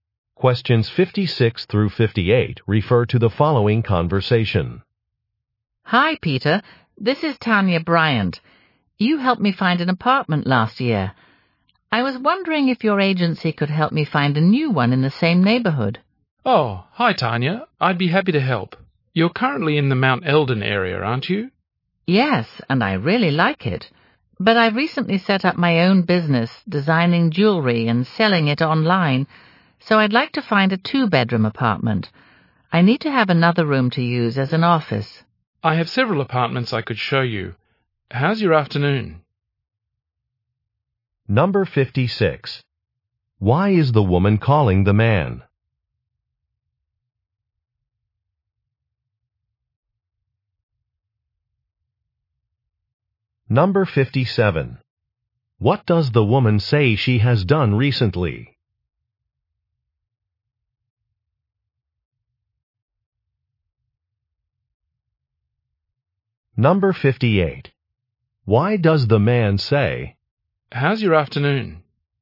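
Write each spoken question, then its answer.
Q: Why is the woman calling the man?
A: To find a new apartment

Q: What does the woman say she has done recently?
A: Started her own jewelry business

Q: Why does the man say,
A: To suggest seeing apartments this afternoon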